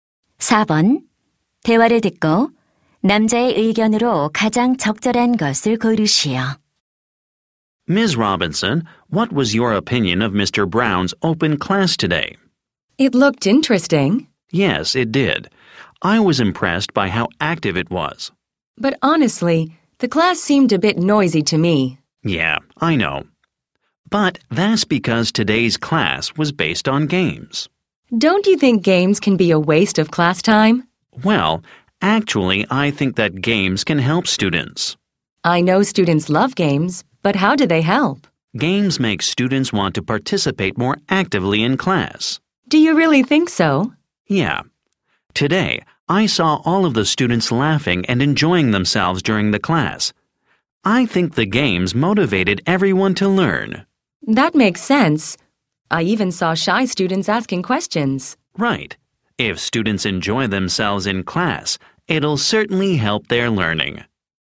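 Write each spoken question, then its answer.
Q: 대화를 듣고 남자의 의견으로 가장 적절한 것을 고르시오.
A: 수업 중 게임은 학생들의 학습에 도움이 된다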